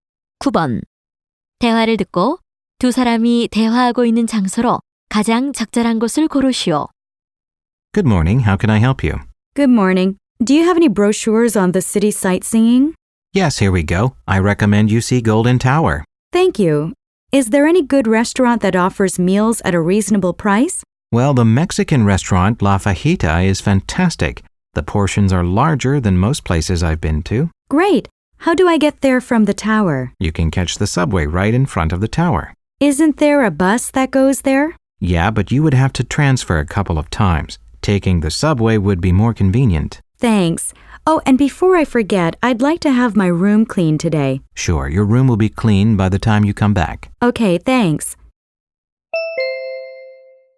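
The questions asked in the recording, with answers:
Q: 대화를 듣고 두 사람이 대화하고 있는 장소로 가장 적절한 곳을 고르시오.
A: 호텔 안내 데스크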